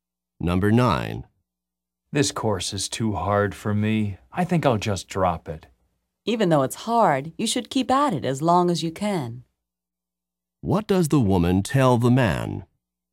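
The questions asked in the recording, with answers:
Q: What does the woman tell the man?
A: He should keep trying in the course and not drop it.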